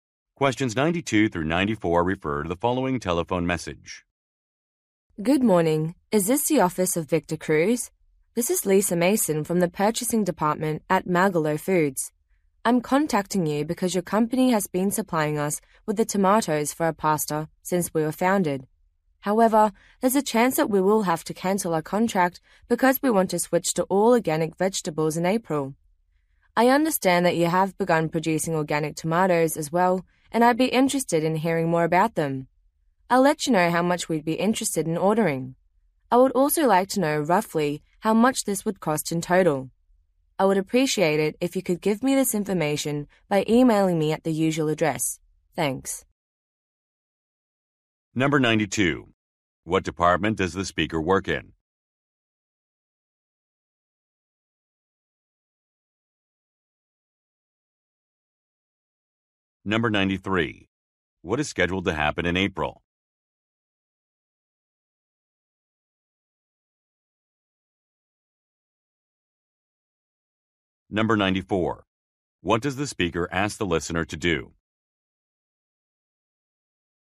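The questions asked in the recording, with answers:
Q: What department does the speaker work in?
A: Purchasing

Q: What is scheduled to happen in April?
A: The company will switch to all organic vegetables

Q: What does the speaker ask the listener to do?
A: Email information about the organic tomatoes and their cost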